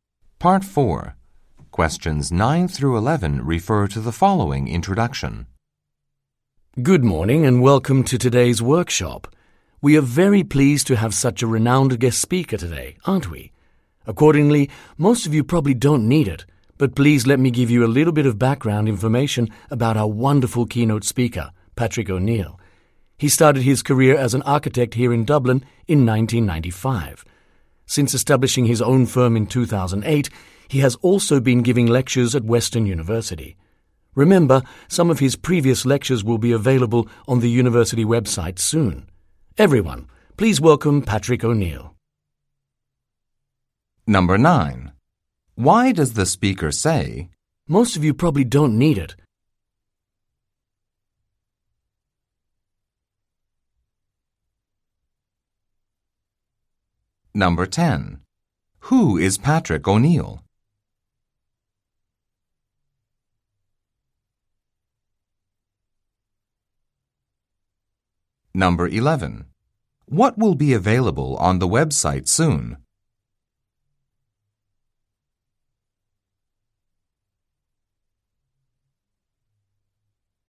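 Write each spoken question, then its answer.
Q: Who is Patrick O'Neill?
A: An architect who also lectures at Western University

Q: What will be available on the website soon?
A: Some of his previous lectures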